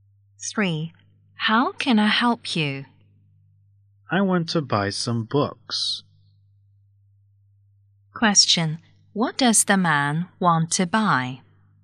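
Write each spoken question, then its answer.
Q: What does the man want to buy?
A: Some books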